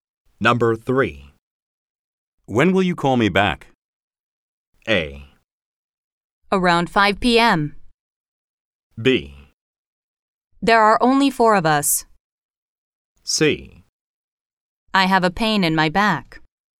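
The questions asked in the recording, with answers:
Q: When will you call me back?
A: A: Around 5 p.m.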